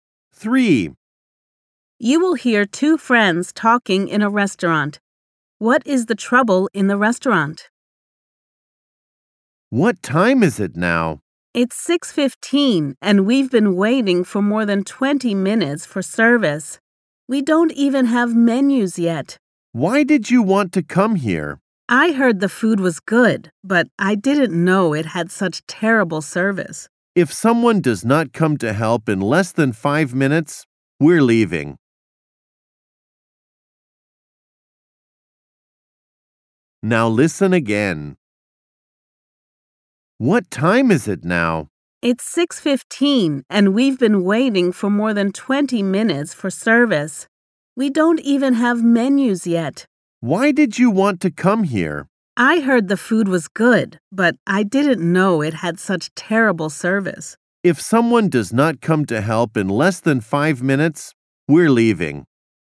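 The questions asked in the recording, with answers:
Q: What is the trouble in the restaurant?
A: The service is terrible; they have waited over 20 minutes and have no menus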